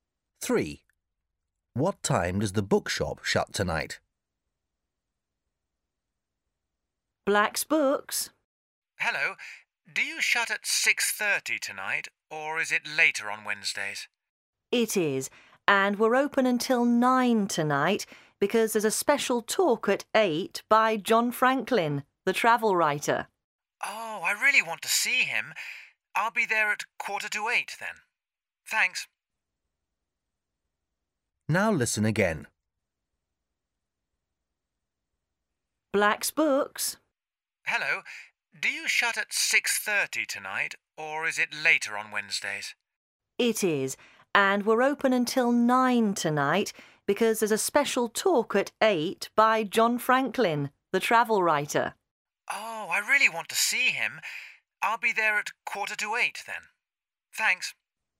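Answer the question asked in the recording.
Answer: 9 o'clock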